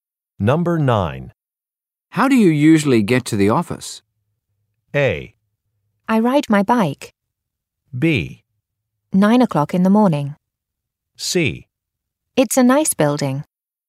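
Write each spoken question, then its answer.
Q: How do you usually get to the office?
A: A: I ride my bike.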